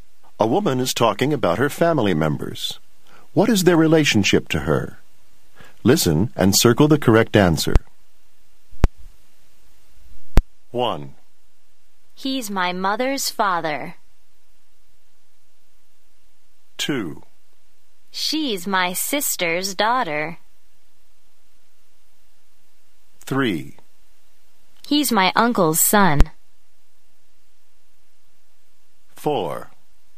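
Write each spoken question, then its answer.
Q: He's my mother's father.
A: her grandfather

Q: She's my sister's daughter.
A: her niece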